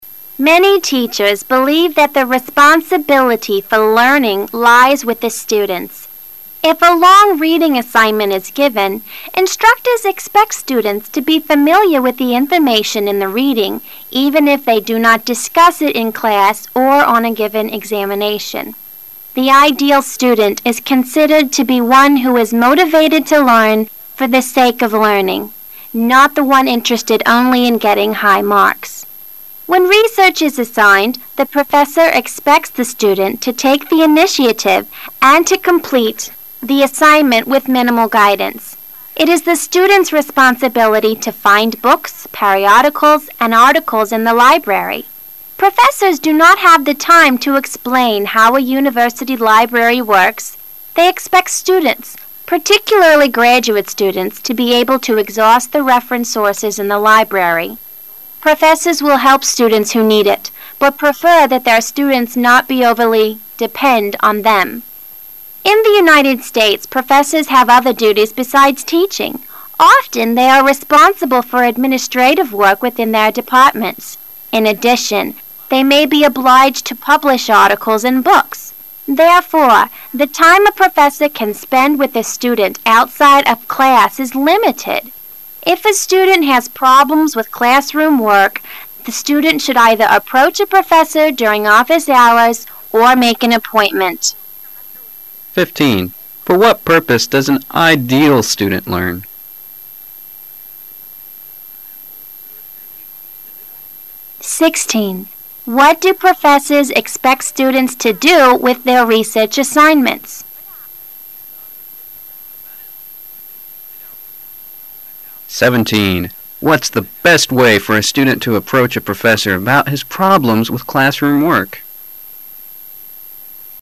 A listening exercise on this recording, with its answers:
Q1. What do professors expect students do with their research assignments?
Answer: To accomplish them mainly through their own efforts.

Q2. What's the best way for a student to approach a professor about his problems with classroom work?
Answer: Make an appointment with him.

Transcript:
[解析] 15-17 Many teachers believe that the responsibility for learning lies with the students. If a long reading assignment is given, instructors expect students to be familiar with the information in the reading even if they do not discuss it in class or on a given examination. The ideal student is considered to be one who is motivated to learn for the sake of learning, not the one interested only in getting high marks. When research is assigned, the professor expects the student to take the initiative and to complete the assignment with minimal guidance. It is the student's responsibility to find hooks, periodicals, and articles in the library, professors do not have the time to explain how a university library works; they expect students, particularly graduate students, to be able to exhaust the reference sources in the library. Professors will help students who need it, but prefer that their students not be overly depend on them. In the United States, professors have other duties besides teaching. Often they are responsible for administrative work within their departments. In addition, they may be obliged to publish articles and books. Therefore, the time a professor can spend with a student outside of class is limited. If a student has problems with classroom work, the student should either approach a professor during office hours or make an appointment. For what purpose does an ideal student learn?